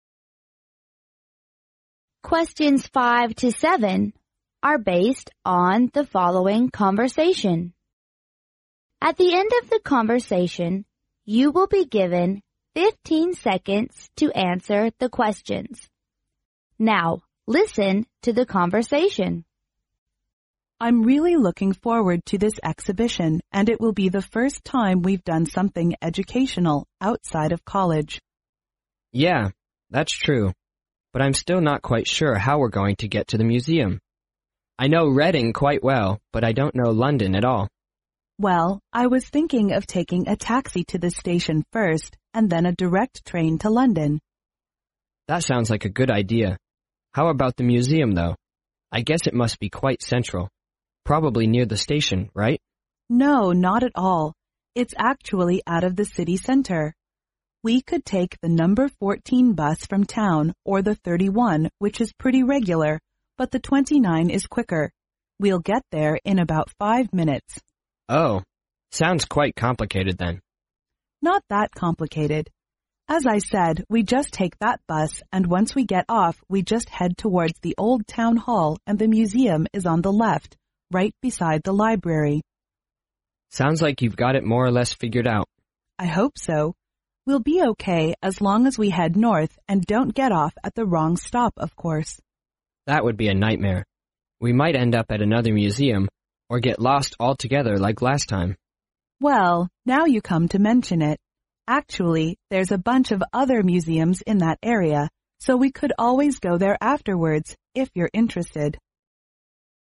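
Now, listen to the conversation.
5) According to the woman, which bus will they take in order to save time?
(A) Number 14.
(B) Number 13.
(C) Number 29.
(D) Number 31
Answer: Number 29.

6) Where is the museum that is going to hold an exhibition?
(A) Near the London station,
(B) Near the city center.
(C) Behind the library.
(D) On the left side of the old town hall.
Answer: On the left side of the old town hall.

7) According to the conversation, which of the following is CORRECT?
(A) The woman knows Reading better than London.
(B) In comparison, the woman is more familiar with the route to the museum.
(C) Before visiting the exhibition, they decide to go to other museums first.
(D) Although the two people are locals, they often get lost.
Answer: In comparison, the woman is more familiar with the route to the museum.

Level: 专业四级

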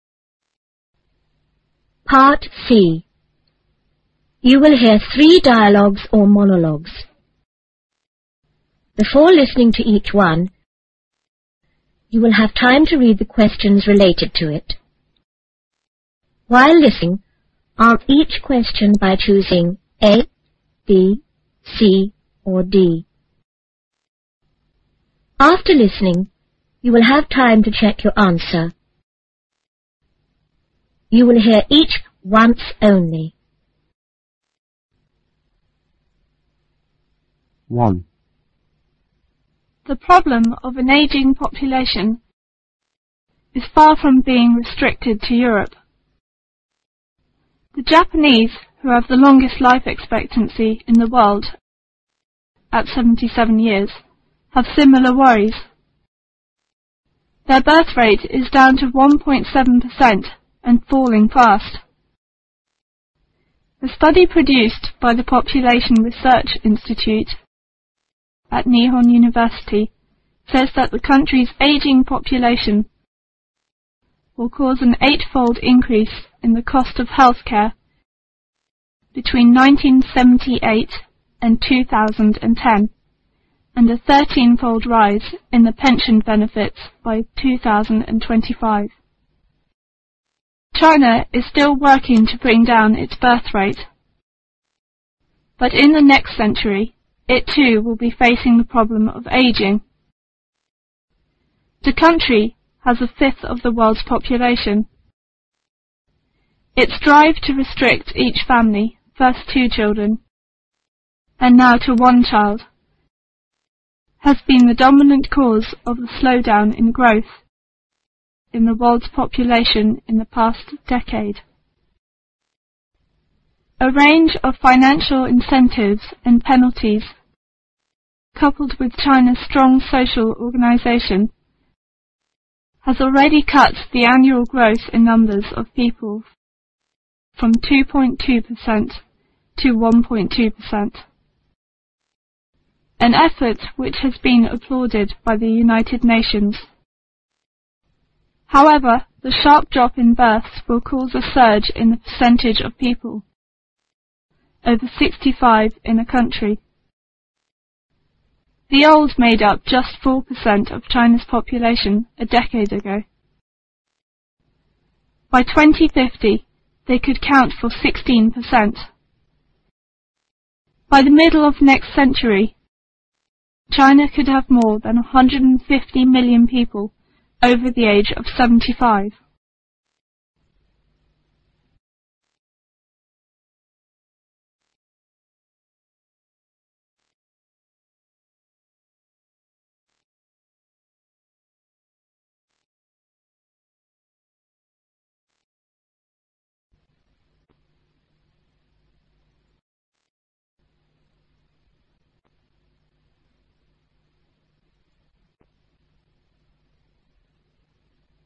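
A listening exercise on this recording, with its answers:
While listening ,answer each question by choosing(A),(B),(C) or(D).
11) What does the speaker mainly talk about?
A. China is successful in cutting down the population growth.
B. Aging population problems affect more parts of the world.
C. The rise in the cost of health care is becoming very sharp.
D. Drops in birth may cause other social problems.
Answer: Aging population problems affect more parts of the world.

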